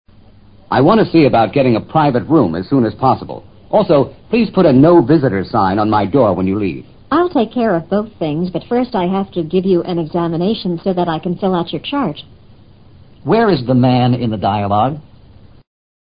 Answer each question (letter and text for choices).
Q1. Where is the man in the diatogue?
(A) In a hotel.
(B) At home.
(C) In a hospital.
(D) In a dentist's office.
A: (C) In a hospital.

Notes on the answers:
根据对话提供的信息,首先可排除A、B。在旅馆或住在家中不必体检、填体检表。只能在C、D之中选择,而整个对话中都未提及牙齿的问题。且他说put a 'No Visitors' sign on my door when you leave, 可见他也不可能在牙医的诊所内。所以C是唯一可能的选择。private room: 单人病房。'No Visitors':谢绝探视。chart: 图表(指病情记录表)。